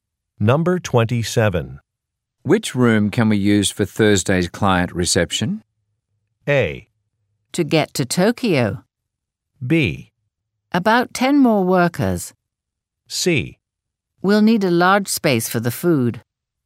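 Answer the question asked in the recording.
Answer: C: We'll need a large space for the food.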